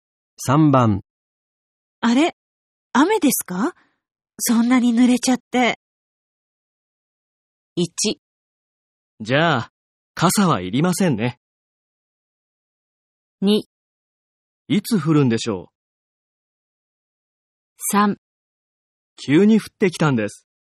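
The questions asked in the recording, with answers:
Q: あれ、雨ですか?そんなに濡れちゃって。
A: 3: 急に降ってきたんです。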